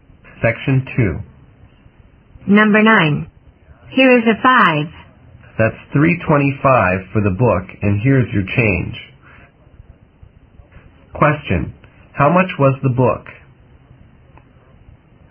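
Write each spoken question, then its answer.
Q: How much was the book?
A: $3.25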